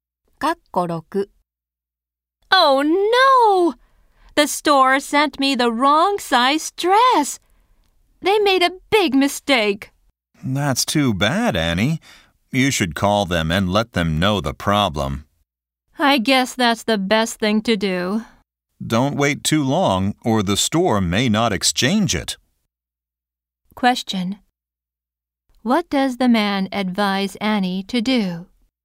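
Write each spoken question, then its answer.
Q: What does the man advise Annie to do?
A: Call the store about the problem.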